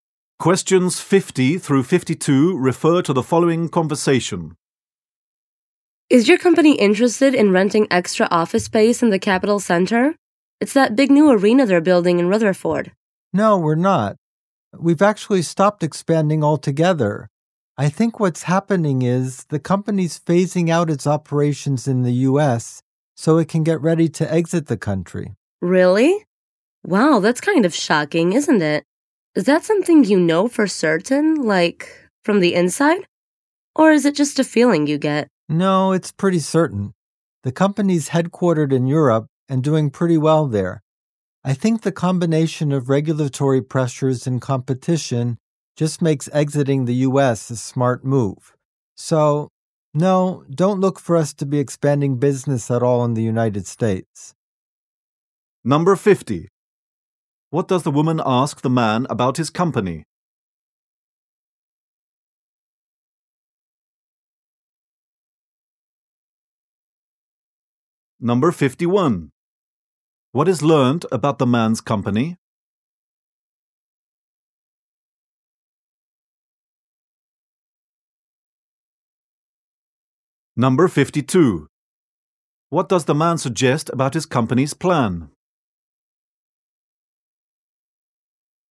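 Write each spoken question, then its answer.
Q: What does the woman ask the man about his company?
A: Whether it wants to rent extra office space in the Capital Center.

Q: What is learned about the man's company?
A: It has its headquarters in Europe and has stopped expanding.

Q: What does the man suggest about his company's plan?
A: It plans to leave the U.S.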